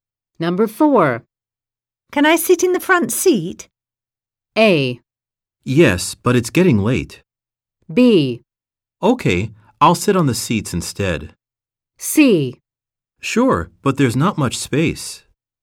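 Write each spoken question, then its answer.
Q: Can I sit in the front seat?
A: C: Sure, but there's not much space.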